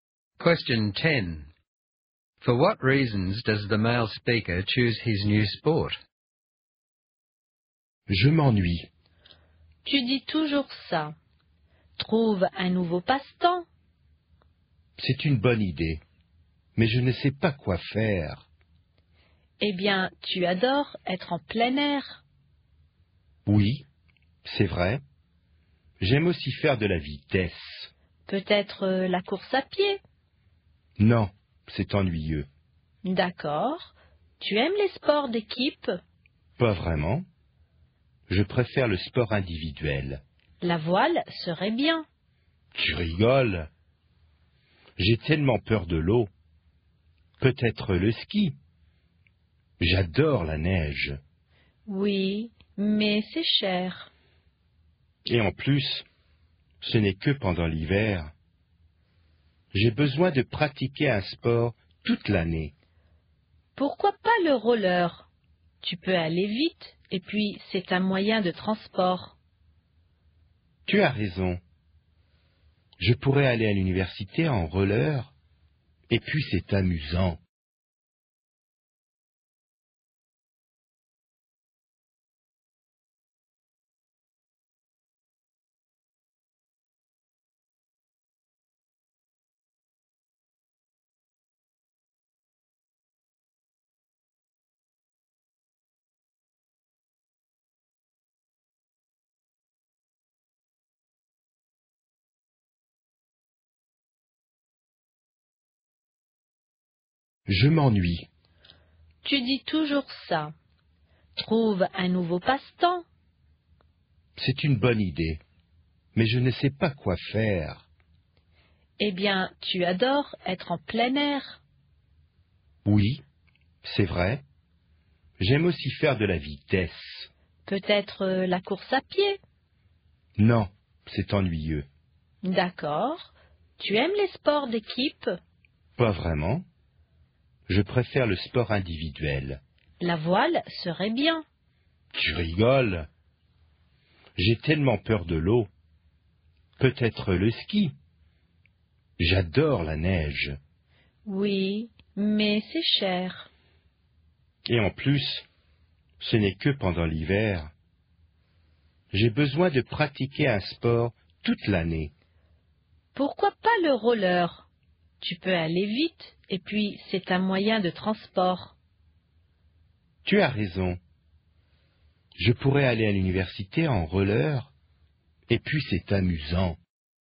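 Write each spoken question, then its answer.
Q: For what reasons does the male speaker choose his new sport?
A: Rollerblading: he can go fast, it's outdoors, it's a means of transport (to university), it's fun, and he can do it all year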